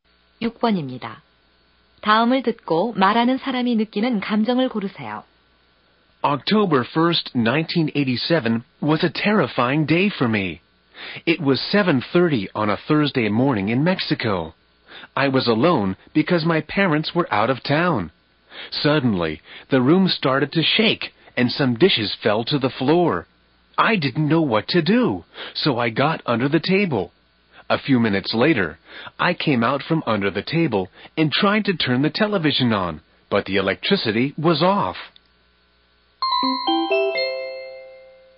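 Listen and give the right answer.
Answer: 무서움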